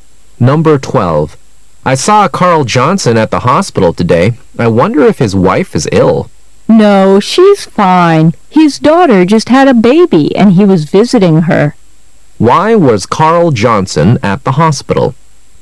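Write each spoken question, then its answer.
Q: Why was Carl Johnson at the hospital?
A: To visit his daughter, who had just had a baby.

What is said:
[解析] M: I saw Carl Johnson at the hospital today.I wonder if his wife is ill. W: No,she's fine. His daughter just had a baby and he was visiting her.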